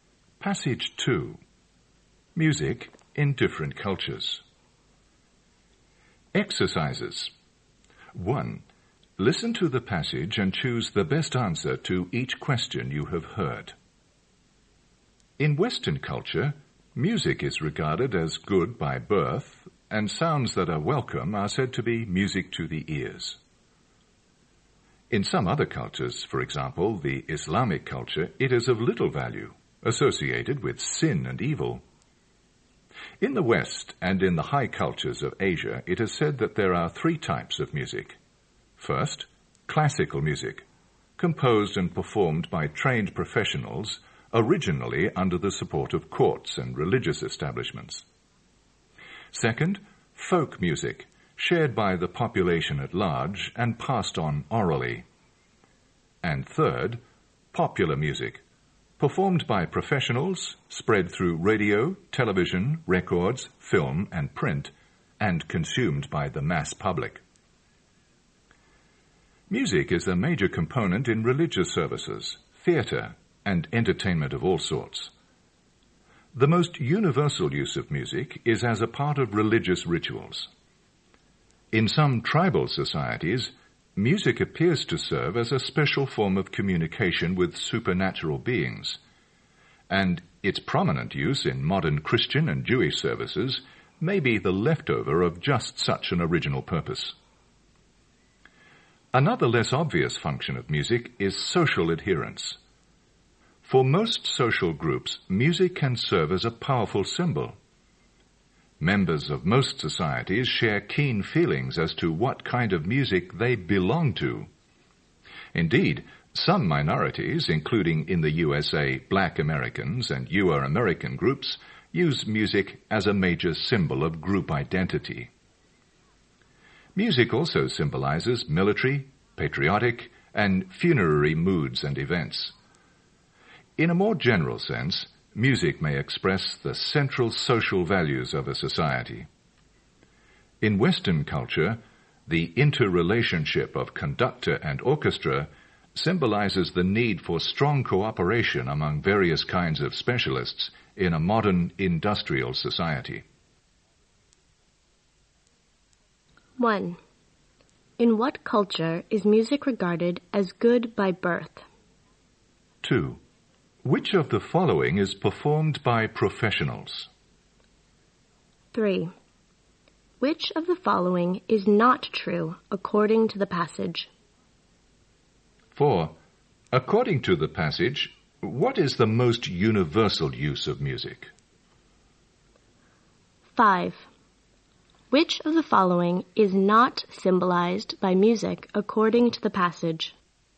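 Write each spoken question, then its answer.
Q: In what culture is music regarded as good by birth?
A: Western culture

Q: According to the passage, what is the most universal use of music?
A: As part of religious rituals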